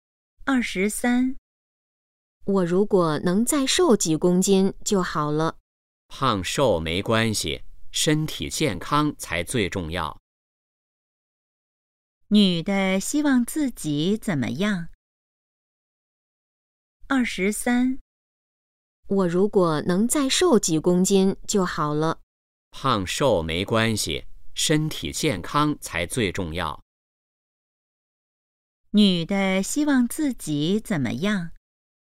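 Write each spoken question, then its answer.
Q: 女的希望自己怎么样?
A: 再瘦几公斤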